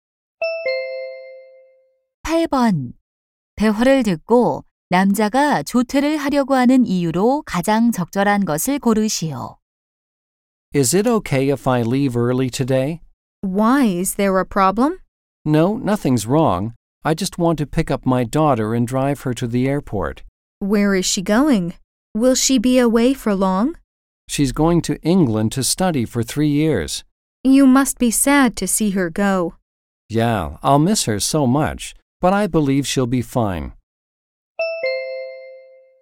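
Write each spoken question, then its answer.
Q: 대화를 듣고 남자가 조퇴를 하려고 하는 이유로 가장 적절한 것을 고르시오.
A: 딸을 공항에 데려다주려고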